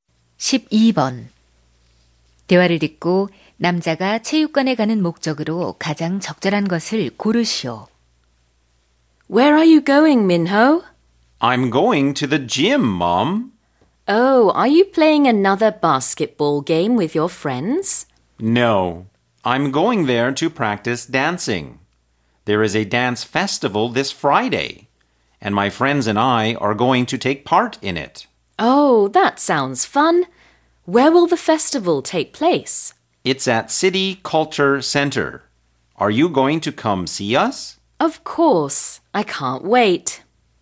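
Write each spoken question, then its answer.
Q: 대화를 듣고 남자가 체육관에 가는 목적으로 가장 적절한 것을 고르시오.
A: 춤 연습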